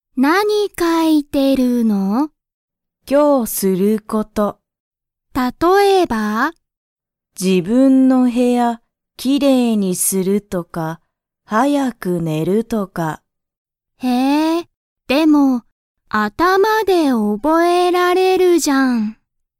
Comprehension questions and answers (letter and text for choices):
Comprehension Quiz (Skip if you don't understand the conversation yet)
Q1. ハルは____を書(か)いている。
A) 今日(きょう)すること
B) 頭(あたま)で覚(おぼ)えること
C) 勉強(べんきょう)のこと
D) 仕事(しごと)のこと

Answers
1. A) 今日(きょう)すること